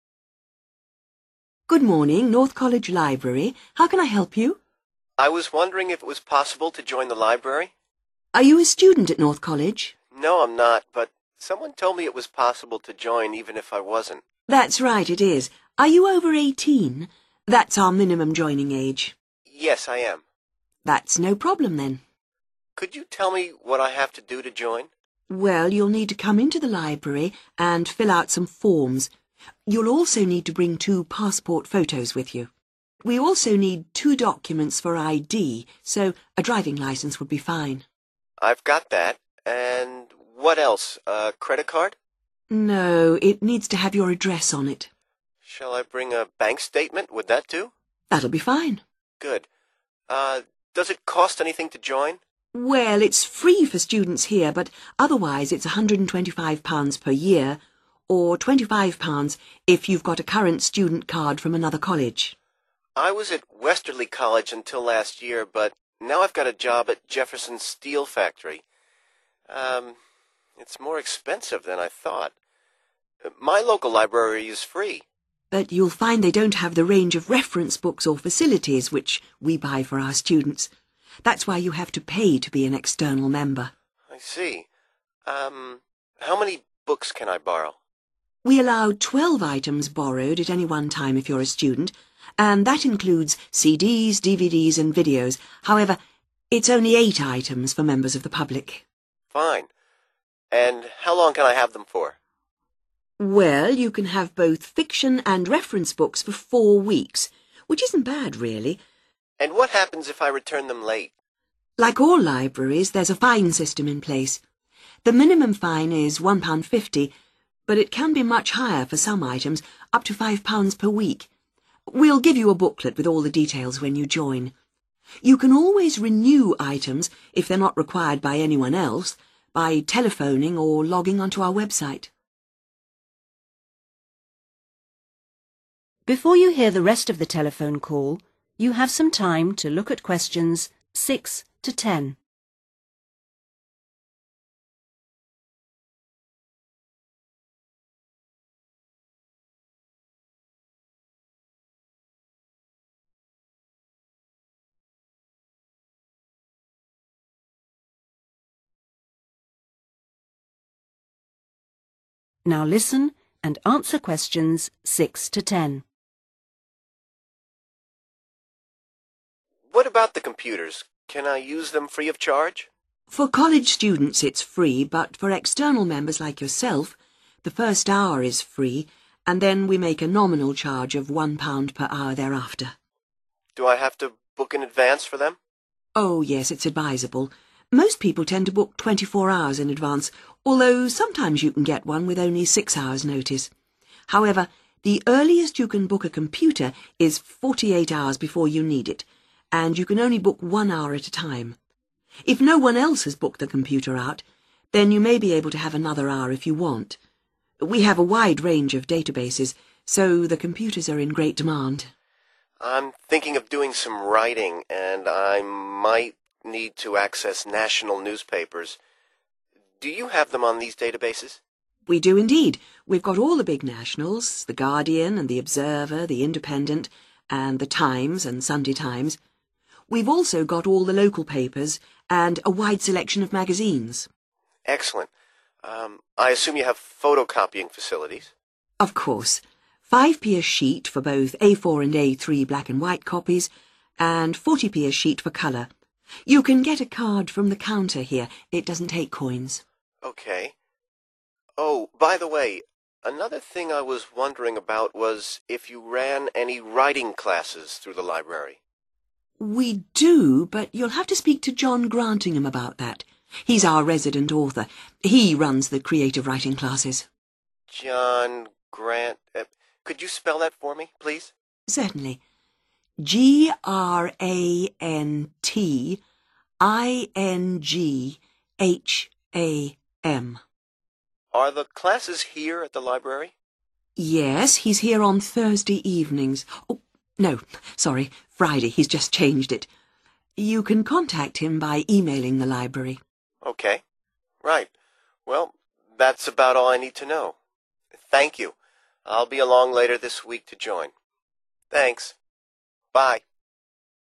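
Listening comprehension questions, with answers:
Complete the form below, using NO MORE THAN THREE WORDS AND/OR A NUMBER for each answer.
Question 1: two 1................ and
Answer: passport photos

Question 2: two forms of I.D. e.g. driving licence, 2 ......................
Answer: bank statement

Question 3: Cost to join per year (without current student card): 3 £ ...........................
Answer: 125

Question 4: Number of items allowed (members of public): 4 ....................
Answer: 8

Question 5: Fines start at 5 £ ...............................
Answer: 1.50

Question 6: Computers can be booked up to 6 .................... hours in advance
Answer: 48

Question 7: Library holds most national papers, all 7 ........................., and magazines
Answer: local papers

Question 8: Need 8 ........................... to use photocopier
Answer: a card

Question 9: tutor is John 9 ................................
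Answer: Grantingham

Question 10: held on 10 .......................... evenings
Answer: Friday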